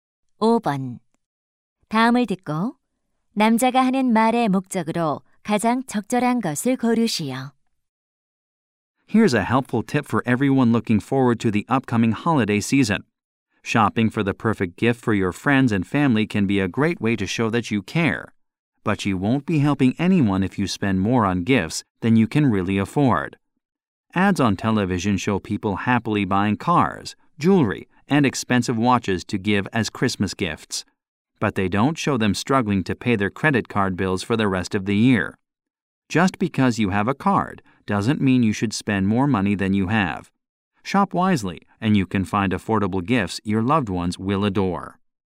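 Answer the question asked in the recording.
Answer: 연휴 선물 구입 시 과소비하지 말라고 조언하려고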